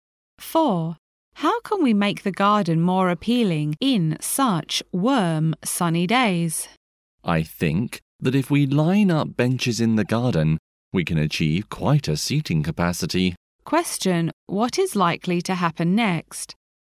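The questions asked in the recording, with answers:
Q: What is likely to happen next?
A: They will line up benches in the garden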